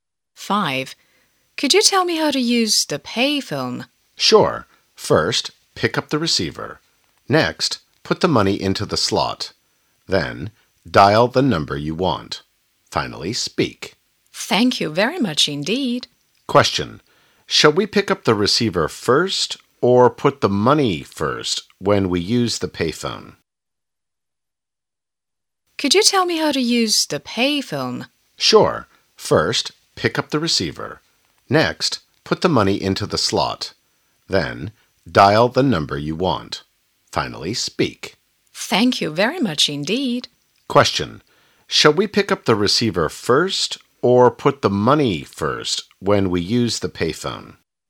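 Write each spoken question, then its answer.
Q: Shall we pick up the receiver first or put the money first when we use the payphone?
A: Pick up the receiver first.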